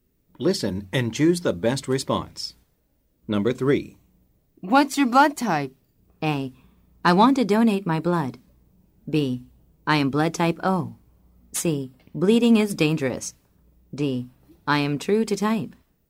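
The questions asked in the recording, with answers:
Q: What's your blood type?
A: B: I am blood type O.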